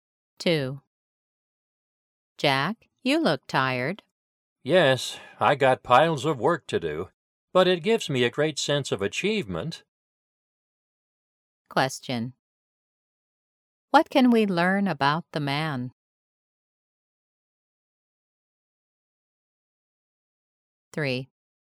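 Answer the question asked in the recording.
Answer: He has a lot of work but finds it rewarding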